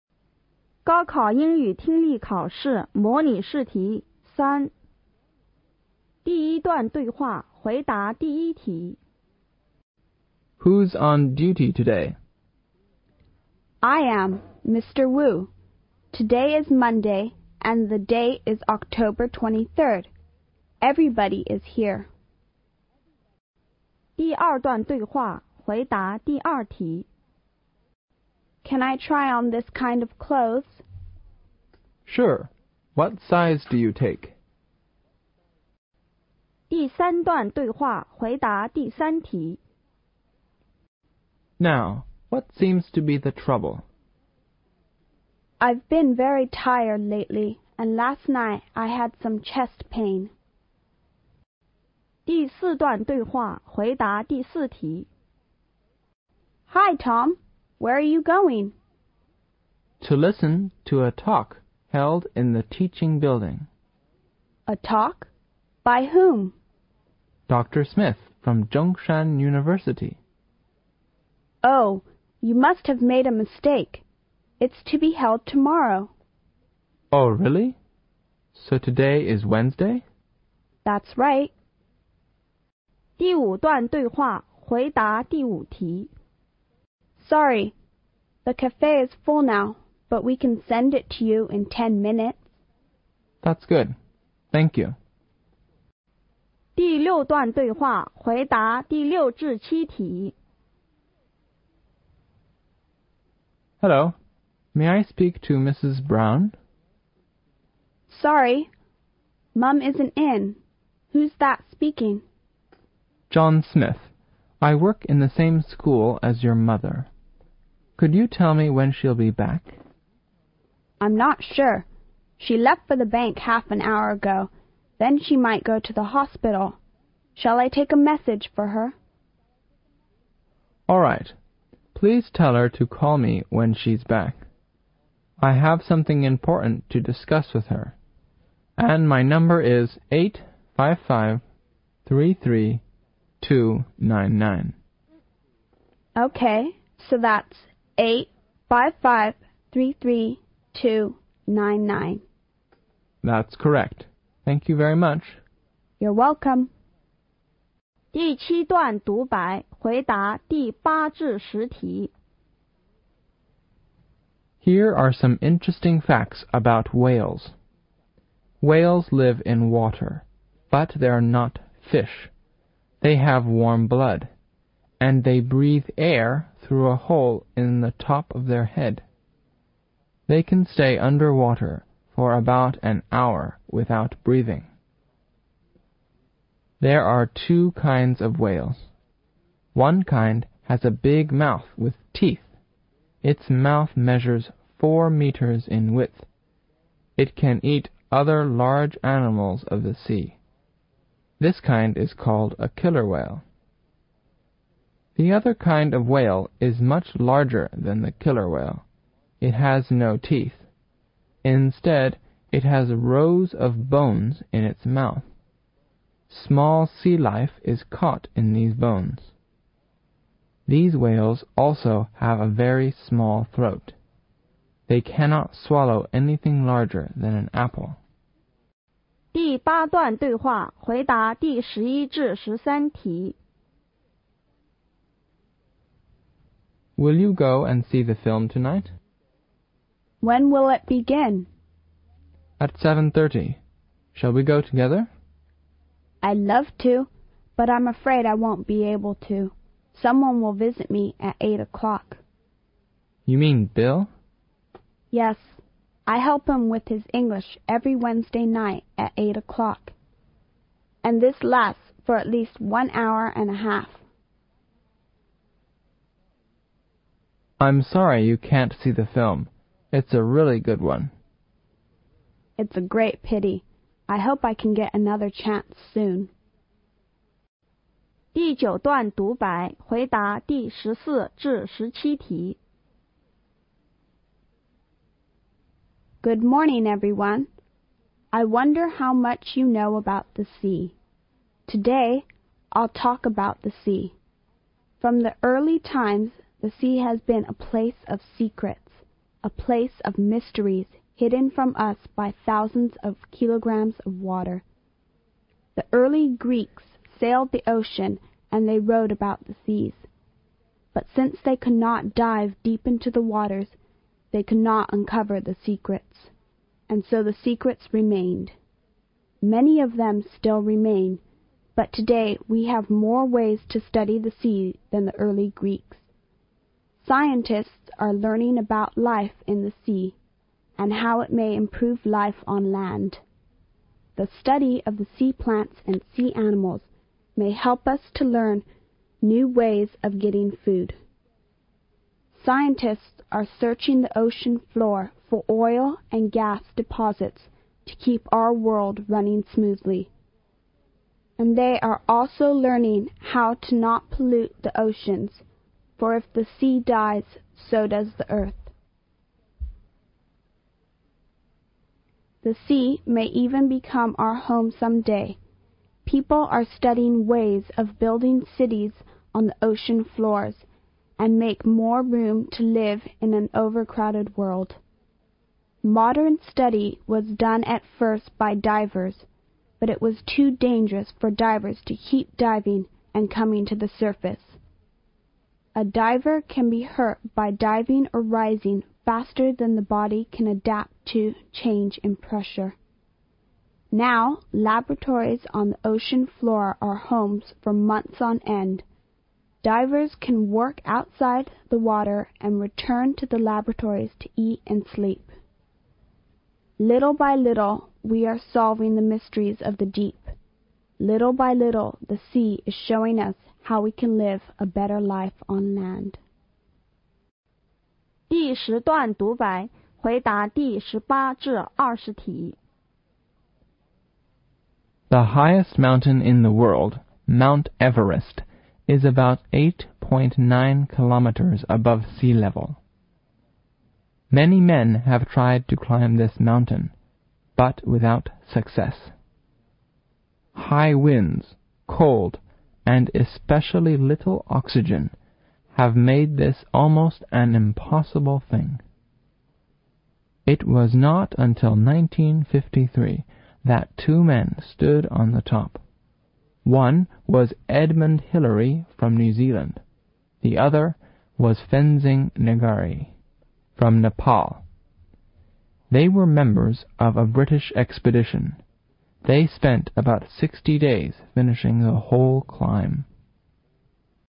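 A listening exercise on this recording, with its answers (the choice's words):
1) What's Mr.Liu?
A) A teacher.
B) A doctor.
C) A policeman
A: A teacher.

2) Where are they?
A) At a hospital.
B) At a clothes shop.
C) At a restaurant.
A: At a clothes shop.

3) What's the probably relationship between the two speakers?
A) Teacher-Student.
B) Doctor-Patient.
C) Husband-Wife.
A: Doctor-Patient.

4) When will the talk be held?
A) On Wednesday.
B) On Thursday.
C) On Saturday.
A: On Thursday.

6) What does the girl's mother probably do?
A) She may be a doctor.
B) She may be a banker.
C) She may be a teacher.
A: She may be a teacher.

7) What's the man's telephone number?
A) 8-55-22-99.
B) 8-55-33-2-99.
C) 8-55-33-22-9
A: 8-55-33-2-99.

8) Why do we see whales are not fish?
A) They live in water.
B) They can eat other animals of the sea.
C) They're warm-blooded and they breath air.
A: They're warm-blooded and they breath air.

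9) How many birds of whales are there according this talk?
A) Two.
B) Four.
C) Several.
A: Two.

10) What's the main difference between the killer whale and other kind?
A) They have small throats.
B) They have a big mouth will teeth.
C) They are big in size.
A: They have a big mouth will teeth.

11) On what day did this conversation probably take place?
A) On Monday.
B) On Tuesday.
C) On Wednesday.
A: On Wednesday.

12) Why didn't the woman go to the cinema tonight?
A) Because she didn't like the film.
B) Because she had to help Bill with his English.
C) Because she wanted to visit someone.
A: Because she had to help Bill with his English.

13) How did the man like the film?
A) He didn't like it.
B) He felt sorry for it.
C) He thought it was wonderful.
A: He thought it was wonderful.

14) Why could the early Greeks not uncover the secrets?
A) Because they could not dive deep into the sea.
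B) Because they didn't have the equipment.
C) Because they couldn't sail the oceans.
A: Because they could not dive deep into the sea.

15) What may help us to learn new ways of getting food?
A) The search of oil and gas deposits on the ocean floor.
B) The study of sea plants and sea animals.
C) Diving deep into the sea.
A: The study of sea plants and sea animals.

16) Why is it dangerous for divers to keep diving and coming to the surface?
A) Because there are many different animals in the oceans.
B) Because the ocean is overcrowded.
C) Because the divers can be hurt.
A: Because the divers can be hurt.

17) Which of the following id the best title?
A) Life in the Ocean.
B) The Sea--Our Future Home.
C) studying Mysteries of the Deep.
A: studying Mysteries of the Deep.

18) How high is the top of mount Everest?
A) 9.8 kilometers.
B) 8900 meters.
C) 19.53 kilometers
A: 8900 meters.

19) When did the people first climb up to the world?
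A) One day in 1953.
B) One day in 1952.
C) In May,1960.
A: One day in 1953.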